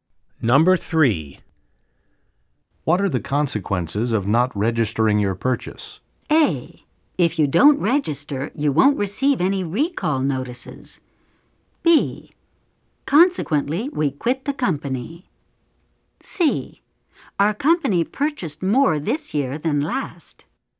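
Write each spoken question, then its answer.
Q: What are the consequences of not registering your purchase?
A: A: If you don't register, you won't receive any recall notices.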